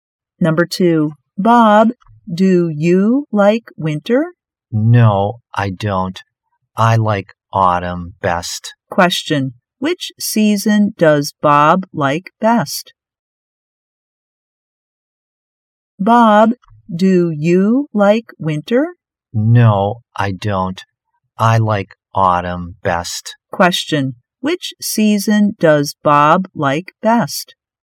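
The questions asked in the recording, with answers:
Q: Which season does Bob like best?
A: Autumn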